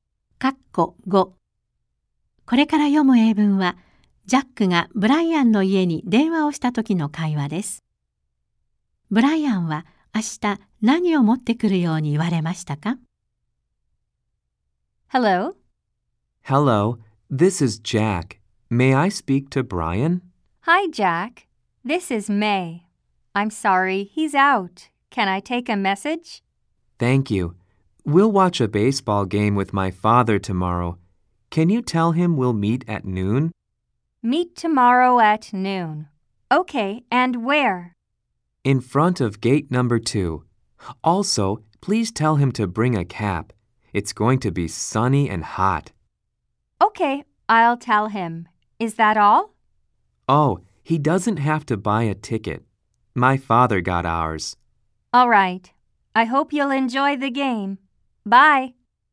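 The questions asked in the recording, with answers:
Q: ブライアンは明日何を持ってくるように言われましたか?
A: 帽子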